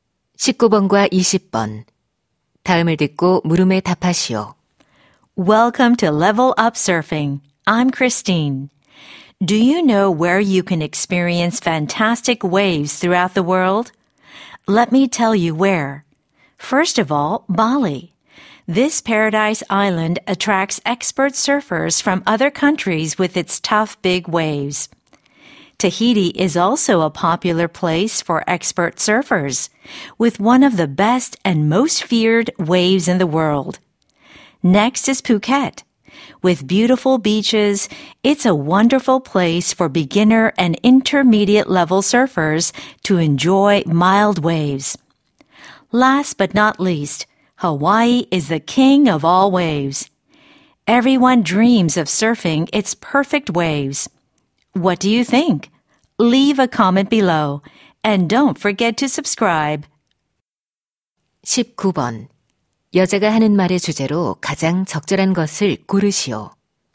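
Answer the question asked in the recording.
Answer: 세계의 서핑하기 좋은 장소들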